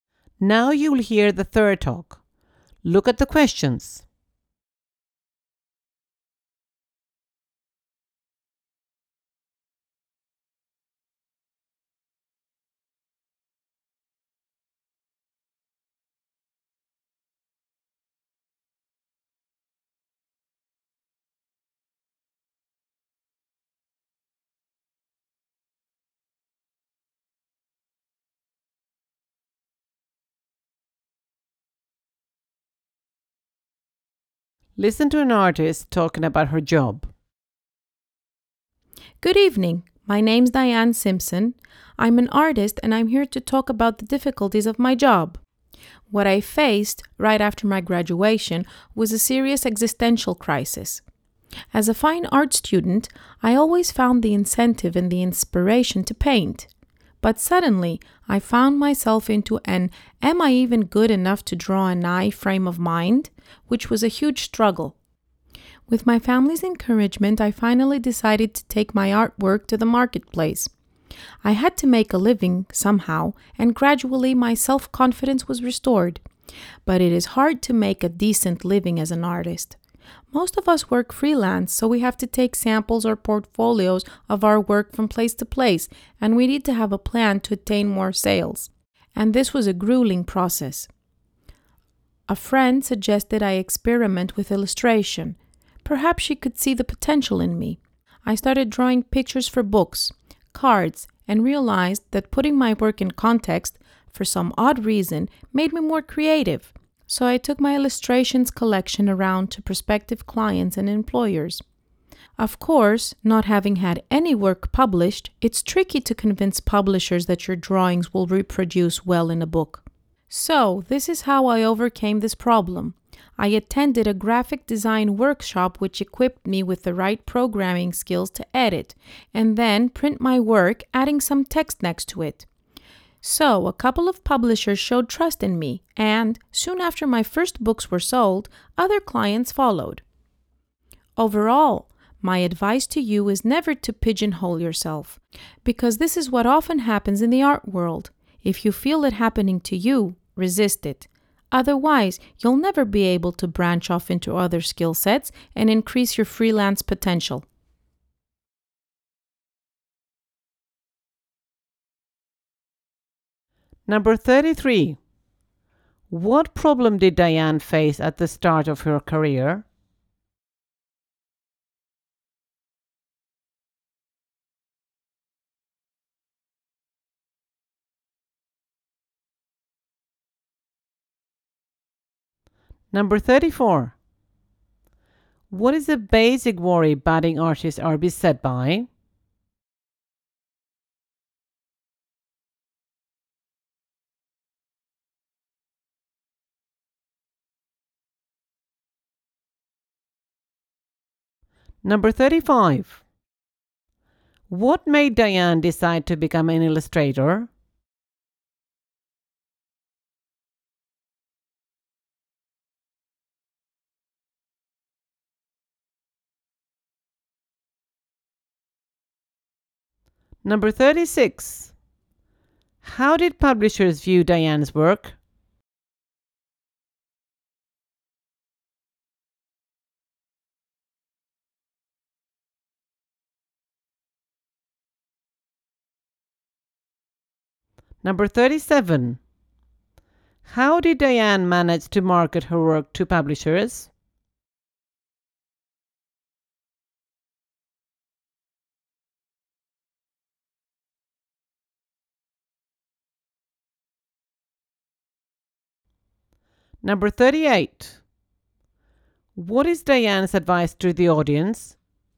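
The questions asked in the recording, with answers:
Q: What problem did Diane face at the start of her career?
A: A serious existential crisis; she doubted she was good enough

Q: What is a basic worry budding artists are beset by?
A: Making a decent living

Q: What made Diane decide to become an illustrator?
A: A friend suggested it

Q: How did publishers view Diane's work?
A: They weren't convinced her drawings would reproduce well in a book, because she had never been published

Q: How did Diane manage to market her work to publishers?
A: She went to a graphic design workshop and learned to edit and print her work with text added

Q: What is Diane's advice to the audience?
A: Never pigeonhole yourself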